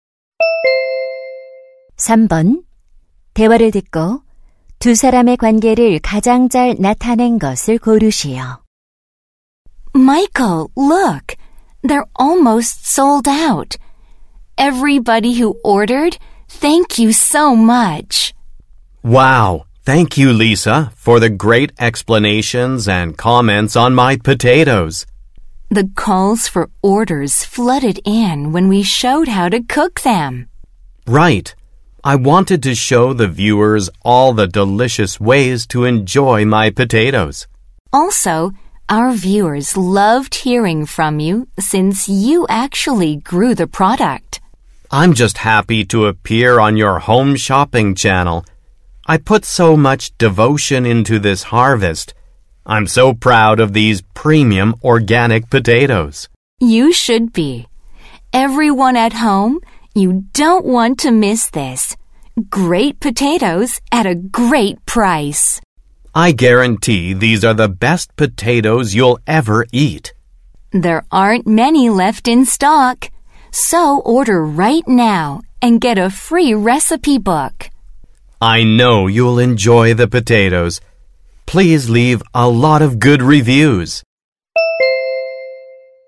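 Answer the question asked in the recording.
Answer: 홈쇼핑 쇼호스트 - 감자 재배 농부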